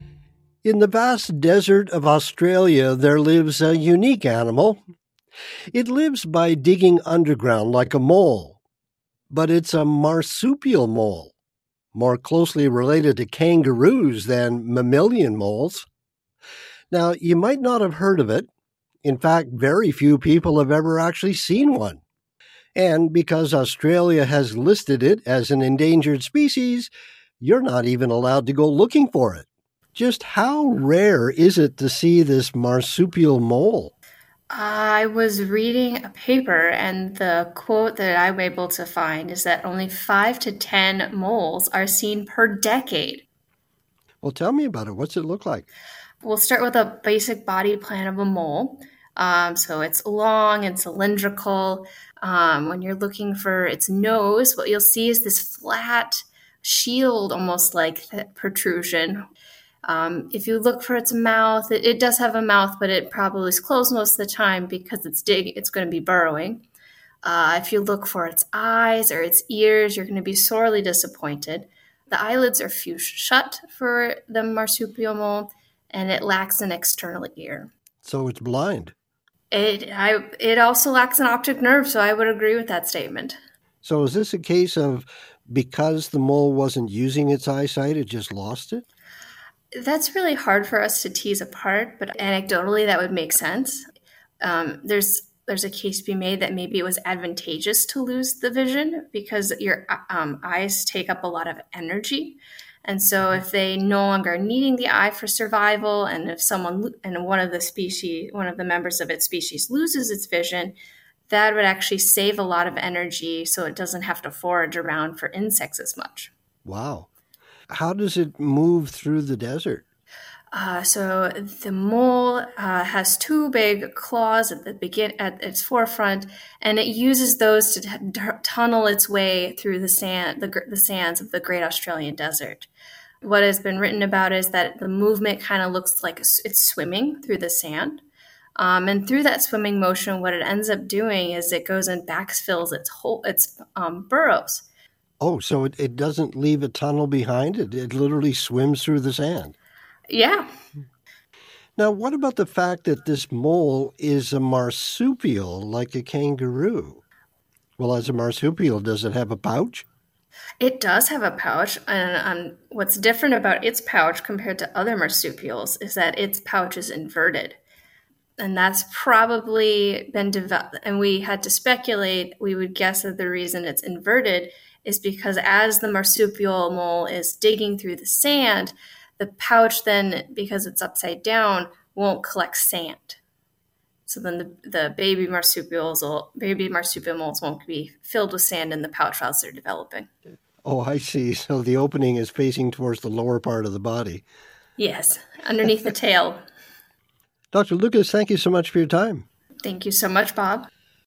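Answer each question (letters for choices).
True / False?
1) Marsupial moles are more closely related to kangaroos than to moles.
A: True

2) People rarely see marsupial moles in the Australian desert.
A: True

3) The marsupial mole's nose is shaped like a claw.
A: False

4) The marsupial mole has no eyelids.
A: False

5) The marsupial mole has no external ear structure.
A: True

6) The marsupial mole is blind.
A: True

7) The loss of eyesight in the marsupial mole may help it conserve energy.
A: True

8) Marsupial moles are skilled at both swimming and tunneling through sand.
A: False

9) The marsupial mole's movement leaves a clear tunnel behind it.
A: False

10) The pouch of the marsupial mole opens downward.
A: True

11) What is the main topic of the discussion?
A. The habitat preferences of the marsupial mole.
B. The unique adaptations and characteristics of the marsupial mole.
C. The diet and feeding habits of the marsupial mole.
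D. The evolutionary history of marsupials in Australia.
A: B

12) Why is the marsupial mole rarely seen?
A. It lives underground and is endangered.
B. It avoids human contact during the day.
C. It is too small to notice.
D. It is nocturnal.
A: A

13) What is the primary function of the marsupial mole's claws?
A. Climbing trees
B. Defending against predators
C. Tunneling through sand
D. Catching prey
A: C

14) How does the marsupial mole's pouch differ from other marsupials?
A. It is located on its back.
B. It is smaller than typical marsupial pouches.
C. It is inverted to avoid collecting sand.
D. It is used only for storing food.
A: C

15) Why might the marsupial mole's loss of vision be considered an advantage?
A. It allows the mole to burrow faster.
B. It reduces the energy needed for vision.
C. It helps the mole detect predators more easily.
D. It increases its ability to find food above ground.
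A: B

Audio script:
In the vast desert of Australia, there lives a unique animal. It lives by digging underground like a mole, but it's a marsupial, more closely related to kangaroos than mammalian moles. Now, you might not have heard of it. In fact, very few people have ever actually seen one. And because Australia has listed it as an endangered species, you're not even allowed to go looking for it. Just how rare is it to see this marsupial mole?
I was reading a paper, and the quote that I was able to find is that only 5 to 10 moles are seen per decade.
Well, tell me about it. What does it look like?
Well, start with a basic body plan of a mole. So, it's long and cylindrical. When you're looking for its nose, what you'll see is this flat shield, almost like a protrusion. If you look for its mouth, it does have a mouth, but it probably is closed most of the time because it's digging, it's going to be burrowing. 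If you look for its eyes or its ears, you're going to be sorely disappointed. The eyelids are fused shut for the marsupial mole, and it lacks an external ear.
So it's blind?
It also lacks an optic nerve, so I would agree with that statement.
So, is this a case of because the mole wasn't using its eyesight, it just lost it?
That's really hard for us to tease apart, but anecdotally, that would make sense.
There's a case to be made that maybe it was advantageous to lose the vision because your eyes take up a lot of energy. And so if they no longer are needing the eyes for survival, and one of the members of its species loses its vision, that would actually save a lot of energy, so it doesn't have to forage around for insects as much.
Wow. How does it move through the desert?
So, the mole has two big claws at its forefront, and it uses those to tunnel its way through the sands of the great Australian desert. 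What has been written about it is that the movement kind of looks like it's swimming through the sand. And through that swimming motion, what it ends up doing is it goes and backfills its burrow.
So, it doesn't leave a tunnel behind? It literally swims through the sand.
Yeah.
Now, what about the fact that this mole is a marsupial like a kangaroo? Well, as a marsupial, does it have a pouch?
And what's different about its pouch compared to other marsupials is that its pouch is inverted. And that's probably... And we had to speculate, we would guess the reason that it's inverted is because as the marsupial mole is digging through the sand, the pouch then, because it's upside down, won't collect sand. So then the baby marsupials moles won't be filled with sand in the pouch as they're developing.
Oh, I see. So, the opening is facing towards the lower part of the body.
Yes, underneath the tail.
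Dr. Lucas. Thank you so much for your time.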